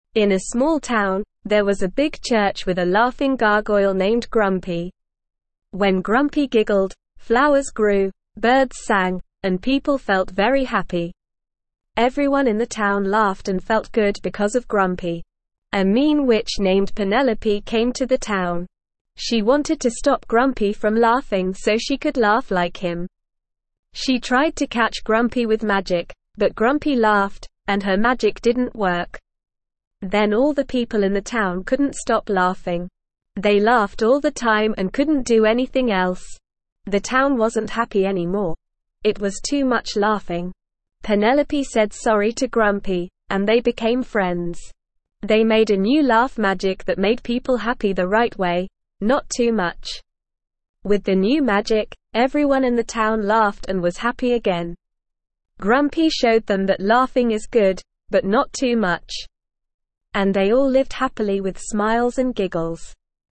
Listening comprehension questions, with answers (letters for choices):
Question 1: In a (1)______ town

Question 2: a laughing gargoyle (2)______ Grumpy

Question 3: She tried to (3)______ Grumpy with magic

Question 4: but Grumpy (4)______, and her magic didn't work.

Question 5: Then all the people in the town couldn't stop (5)______ing.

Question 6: (6)______ said sorry to Grumpy, and they became friends.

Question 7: They made a new laugh magic that made people (7)______ the right way, not too much.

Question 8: And they all lived happily with (8)______ and giggles.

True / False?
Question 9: Penelope tried to use magic to catch Grumpy, but it didn't work because Grumpy laughed.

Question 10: Penelope refused to apologize to Grumpy and they remained enemies, and together they made a new magic that made people unhappy the right way, not too little.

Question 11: The town became unhappy because there was too much laughing.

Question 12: When Penelope's magic didn't work, everyone in the town stopped laughing and became constantly sad.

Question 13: When Grumpy laughed, bad things happened like flowers wilting and birds dying.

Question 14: The people in the town felt very happy because of Grumpy's laughter.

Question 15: There was a small church in a big town with a gargoyle named Grumpy who despised laughter.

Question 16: A mean witch named Penelope came to the town and wanted to stop Grumpy from laughing.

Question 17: What was the name of the laughing gargoyle?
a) Grumpy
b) Happy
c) Sad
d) Silly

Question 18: What happened when Grumpy giggled?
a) Trees disappeared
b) People cried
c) Flowers grew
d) Birds flew away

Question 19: Who came to the town and wanted to stop Grumpy from laughing?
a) Jack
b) Sarah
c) Penelope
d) Michael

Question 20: How did Penelope try to catch Grumpy?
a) With a net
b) With magic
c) With a stick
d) With a book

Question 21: What happened to the people in the town when Grumpy laughed?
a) They became sad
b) They couldn't stop laughing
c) They fell asleep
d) They started crying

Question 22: What did Penelope do after her magic didn't work?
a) She ran away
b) She laughed with Grumpy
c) She cried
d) She said sorry to Grumpy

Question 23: What did Grumpy and Penelope make together?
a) New cry magic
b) New sleep magic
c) New sad magic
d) New laugh magic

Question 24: How did everyone in the town feel after they had the new laugh magic?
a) Happy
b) Angry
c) Scared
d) Bored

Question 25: What made the people in the town feel happy?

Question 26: What did the mean witch want to do?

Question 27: Did the mean witch's magic work on Grumpy?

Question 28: What happened when the people in the town couldn't stop laughing?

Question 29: Did Grumpy and Penelope become friends in the end?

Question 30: How did Grumpy and Penelope make people happy again?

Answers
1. small
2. named
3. catch
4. laughed
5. laugh
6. Penelope
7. happy
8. smiles
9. True
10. False
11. True
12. False
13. False
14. True
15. False
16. True
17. a
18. c
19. c
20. b
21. b
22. d
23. d
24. a
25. Grumpy, the laughing gargoyle, made the people in the town feel happy.
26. The mean witch wanted to stop Grumpy from laughing so she could laugh like him.
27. No, the mean witch's magic didn't work on Grumpy.
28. When the people in the town couldn't stop laughing, they couldn't do anything else and the town wasn't happy anymore.
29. Yes, Grumpy and Penelope became friends in the end.
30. Grumpy and Penelope made people happy again by creating a new laugh magic that made people happy the right way, not too much.

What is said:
In a small town, there was a big church with a laughing gargoyle named Grumpy. When Grumpy giggled, flowers grew, birds sang, and people felt very happy. Everyone in the town laughed and felt good because of Grumpy.
A mean witch named Penelope came to the town. She wanted to stop Grumpy from laughing so she could laugh like him. She tried to catch Grumpy with magic, but Grumpy laughed, and her magic didn't work.
Then all the people in the town couldn't stop laughing. They laughed all the time and couldn't do anything else. The town wasn't happy anymore; it was too much laughing!
Penelope said sorry to Grumpy, and they became friends. They made a new laugh magic that made people happy the right way, not too much. With the new magic, everyone in the town laughed and was happy again. Grumpy showed them that laughing is good, but not too much. And they all lived happily with smiles and giggles.

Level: Level 1